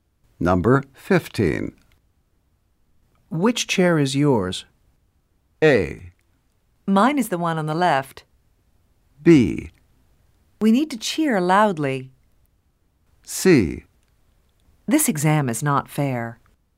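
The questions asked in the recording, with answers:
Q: Which chair is yours?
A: A: Mine is the one on the left.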